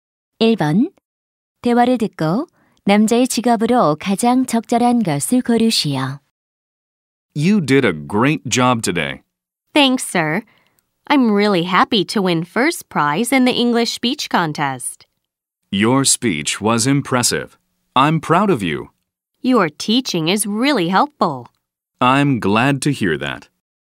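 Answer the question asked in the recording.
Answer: 교사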